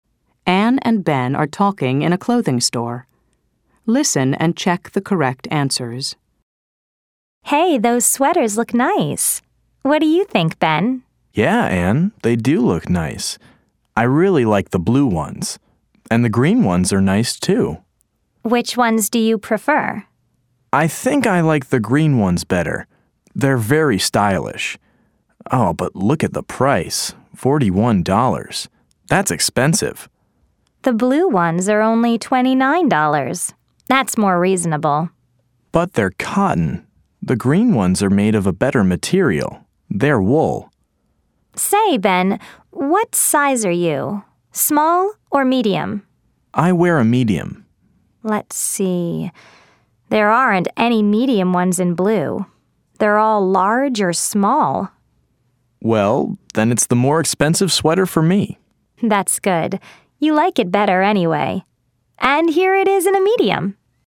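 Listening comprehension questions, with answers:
Ann and Ben are talking in a clothing store. Listen and choose the correct answers.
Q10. Ben's size is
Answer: medium

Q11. Ben prefers the _____________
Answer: green ones

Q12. The green sweaters are made of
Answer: wool

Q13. The green sweaters are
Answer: $41, expensive

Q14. The blue sweaters are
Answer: $29, cotton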